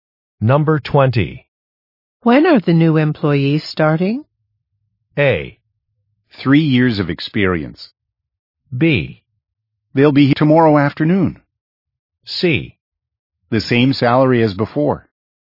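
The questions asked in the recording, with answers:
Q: When are the new employees starting?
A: B: They'll be here tomorrow afternoon.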